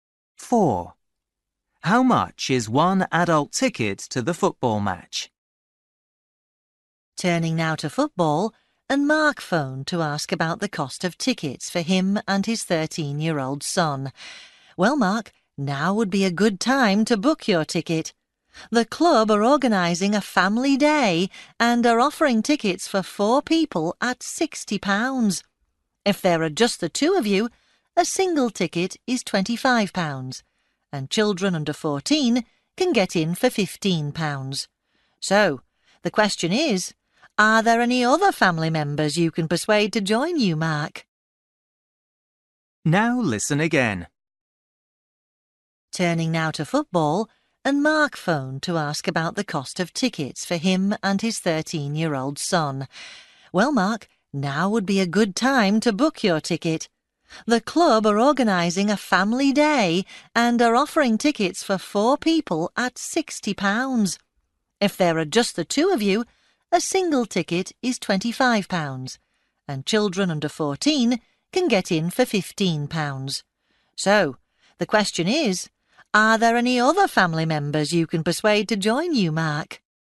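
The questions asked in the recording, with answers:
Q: How much is one adult ticket to the football match?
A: £25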